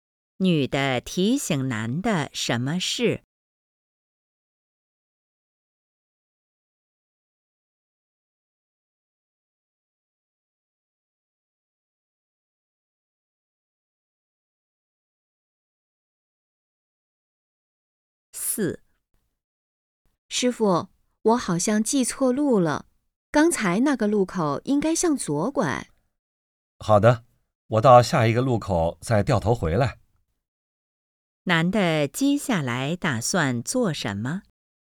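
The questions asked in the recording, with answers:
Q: 男的接下来打算做什么?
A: 到下一个路口掉头回来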